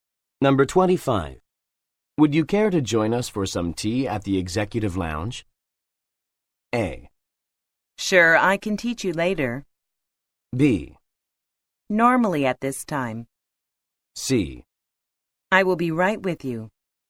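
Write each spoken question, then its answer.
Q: Would you care to join us for some tea at the executive lounge?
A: C: I will be right with you.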